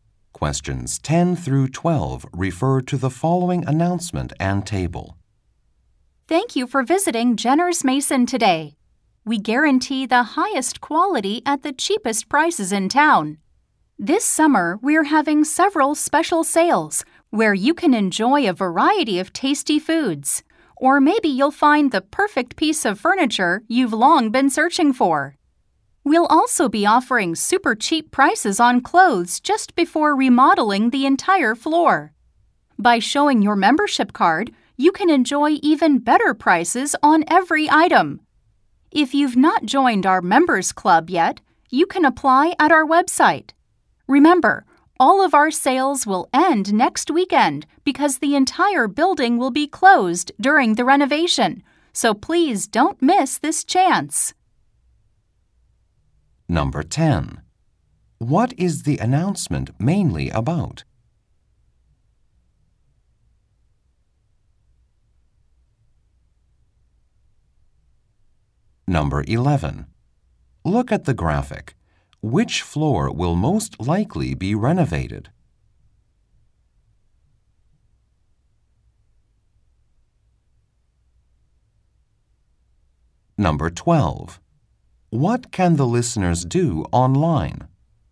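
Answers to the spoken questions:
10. Special summer sales at the store
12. Apply for the members club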